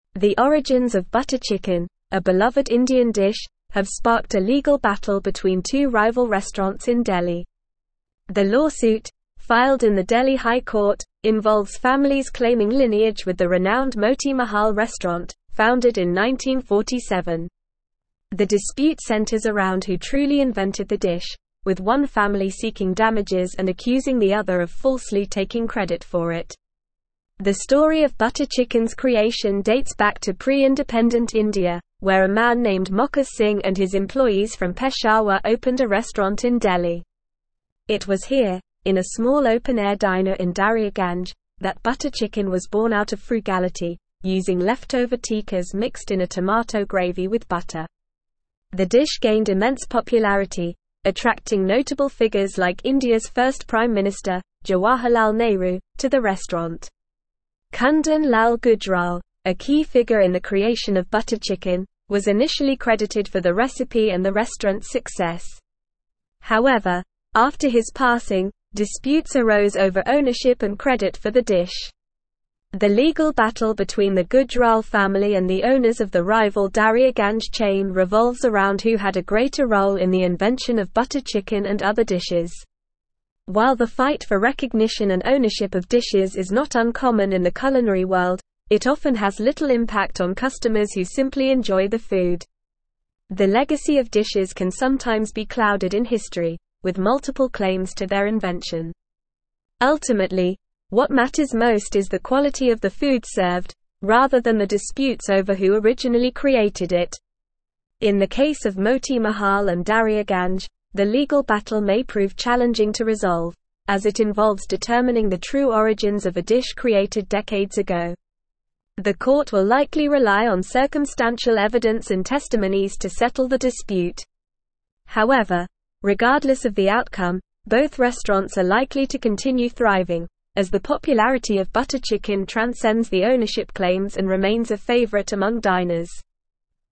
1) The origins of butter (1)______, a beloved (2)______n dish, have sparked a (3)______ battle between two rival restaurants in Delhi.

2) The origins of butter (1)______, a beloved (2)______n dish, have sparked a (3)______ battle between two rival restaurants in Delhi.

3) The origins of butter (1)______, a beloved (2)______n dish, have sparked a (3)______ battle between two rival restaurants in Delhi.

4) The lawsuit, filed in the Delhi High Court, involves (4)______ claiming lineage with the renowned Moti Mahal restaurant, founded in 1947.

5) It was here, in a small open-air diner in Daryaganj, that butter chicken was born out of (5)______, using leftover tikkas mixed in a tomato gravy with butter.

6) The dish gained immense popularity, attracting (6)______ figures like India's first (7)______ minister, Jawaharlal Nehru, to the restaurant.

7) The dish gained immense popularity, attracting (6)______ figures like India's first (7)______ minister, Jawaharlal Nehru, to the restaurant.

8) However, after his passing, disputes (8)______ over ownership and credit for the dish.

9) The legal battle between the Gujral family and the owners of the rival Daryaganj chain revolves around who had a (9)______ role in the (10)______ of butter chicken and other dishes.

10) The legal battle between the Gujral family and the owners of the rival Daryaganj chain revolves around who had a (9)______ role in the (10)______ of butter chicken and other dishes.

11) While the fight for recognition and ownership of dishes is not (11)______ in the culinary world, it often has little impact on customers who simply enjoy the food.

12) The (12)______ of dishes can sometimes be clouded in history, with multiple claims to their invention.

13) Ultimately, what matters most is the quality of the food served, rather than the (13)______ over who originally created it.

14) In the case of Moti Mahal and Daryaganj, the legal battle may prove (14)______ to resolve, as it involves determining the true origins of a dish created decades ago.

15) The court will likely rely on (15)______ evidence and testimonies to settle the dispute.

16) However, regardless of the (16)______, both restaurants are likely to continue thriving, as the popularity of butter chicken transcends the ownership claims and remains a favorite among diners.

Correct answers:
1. chicken
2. India
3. legal
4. families
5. frugality
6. notable
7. prime
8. arose
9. greater
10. invention
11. uncommon
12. legacy
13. disputes
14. challenging
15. circumstantial
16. outcome

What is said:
The origins of butter chicken, a beloved Indian dish, have sparked a legal battle between two rival restaurants in Delhi. The lawsuit, filed in the Delhi High Court, involves families claiming lineage with the renowned Moti Mahal restaurant, founded in 1947. The dispute centers around who truly invented the dish, with one family seeking damages and accusing the other of falsely taking credit for it.
The story of butter chicken's creation dates back to pre-Independent India, where a man named Mokha Singh and his employees from Peshawar opened a restaurant in Delhi. It was here, in a small open-air diner in Daryaganj, that butter chicken was born out of frugality, using leftover tikkas mixed in a tomato gravy with butter. The dish gained immense popularity, attracting notable figures like India's first prime minister, Jawaharlal Nehru, to the restaurant.
Kundan Lal Gujral, a key figure in the creation of butter chicken, was initially credited for the recipe and the restaurant's success. However, after his passing, disputes arose over ownership and credit for the dish. The legal battle between the Gujral family and the owners of the rival Daryaganj chain revolves around who had a greater role in the invention of butter chicken and other dishes.
While the fight for recognition and ownership of dishes is not uncommon in the culinary world, it often has little impact on customers who simply enjoy the food. The legacy of dishes can sometimes be clouded in history, with multiple claims to their invention. Ultimately, what matters most is the quality of the food served, rather than the disputes over who originally created it.
In the case of Moti Mahal and Daryaganj, the legal battle may prove challenging to resolve, as it involves determining the true origins of a dish created decades ago. The court will likely rely on circumstantial evidence and testimonies to settle the dispute. However, regardless of the outcome, both restaurants are likely to continue thriving, as the popularity of butter chicken transcends the ownership claims and remains a favorite among diners.

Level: Level 4